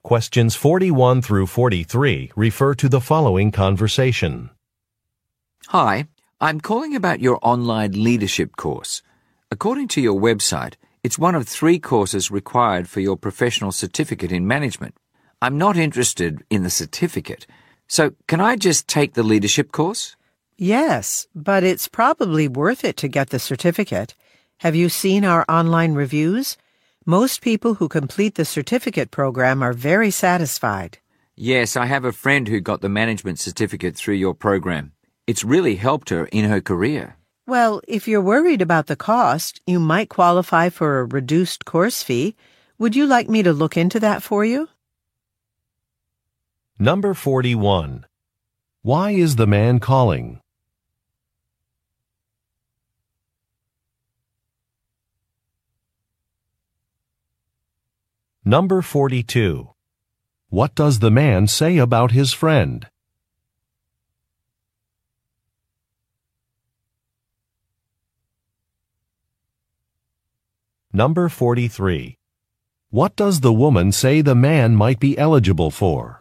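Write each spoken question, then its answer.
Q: Why is the man calling?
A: To ask whether he can take only the online leadership course, without the certificate

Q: What does the man say about his friend?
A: She got the management certificate, and it has really helped her career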